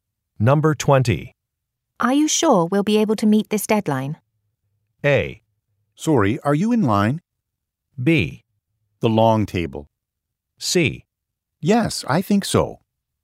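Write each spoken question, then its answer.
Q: Are you sure we'll be able to meet this deadline?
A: C: Yes, I think so.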